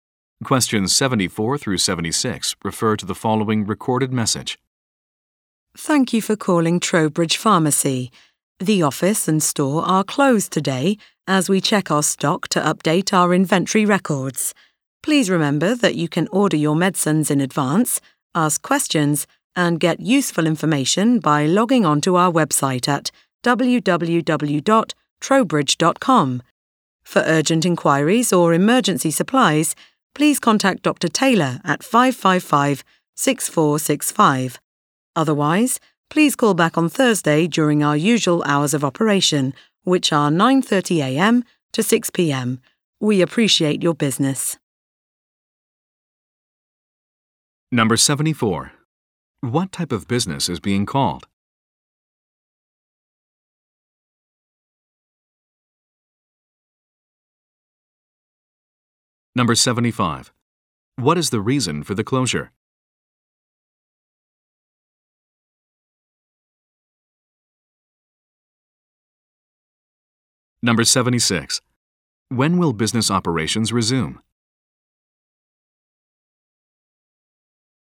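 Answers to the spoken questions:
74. A pharmacy
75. To check stock and update inventory records
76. On Thursday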